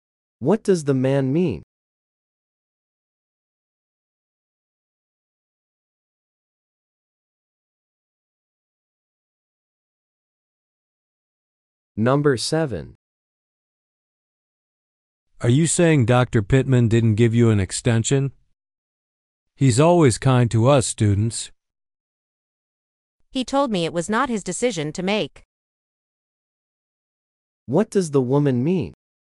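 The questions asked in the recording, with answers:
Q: What does the woman mean?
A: Someone other than Dr. Pittman decides on extensions.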